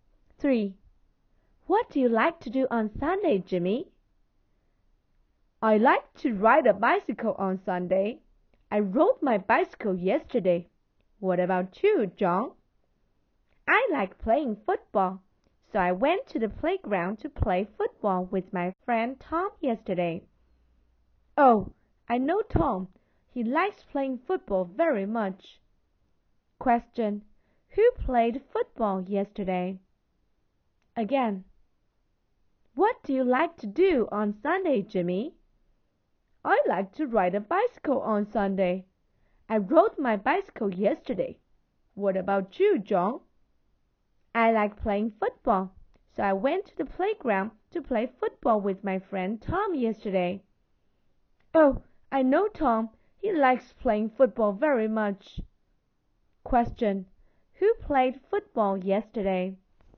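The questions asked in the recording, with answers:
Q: Who played football yesterday?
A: John and Tom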